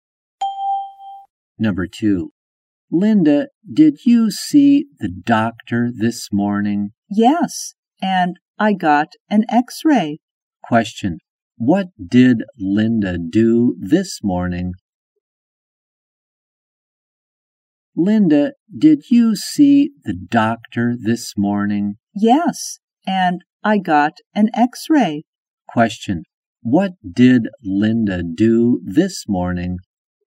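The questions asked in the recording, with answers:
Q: What did Linda do this morning?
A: She saw the doctor and got an x-ray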